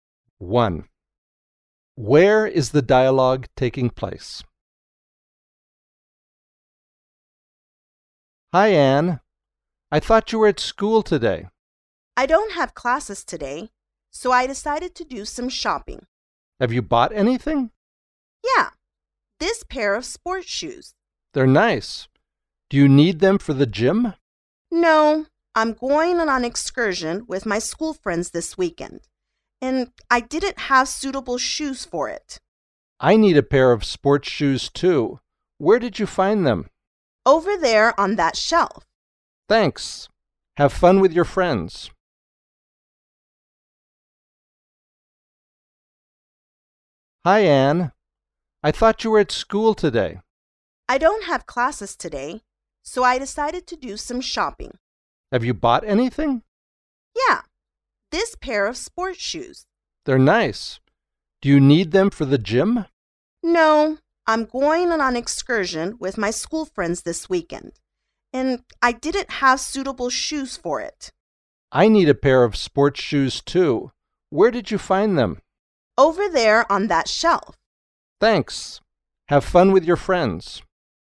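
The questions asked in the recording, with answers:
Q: Where is the dialogue taking place?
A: In a shoe shop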